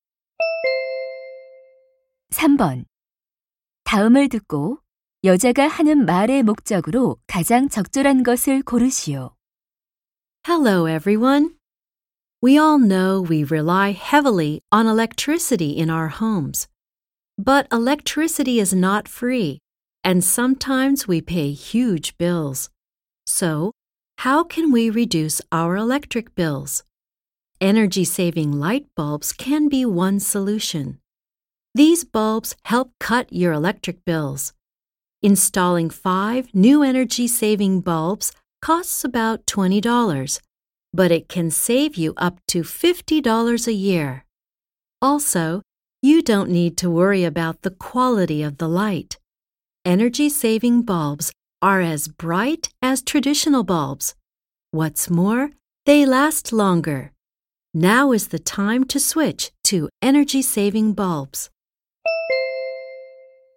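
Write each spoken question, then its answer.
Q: 다음을 듣고 여자가 하는 말의 목적으로 가장 적절한 것을 고르시오.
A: 에너지 절약 전구로 바꾸도록 권장하려고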